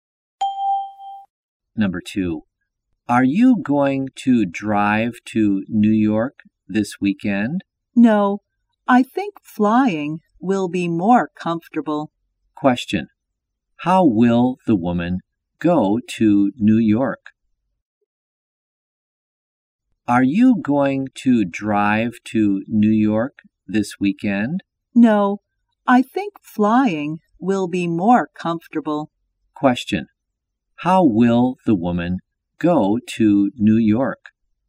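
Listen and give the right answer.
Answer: By plane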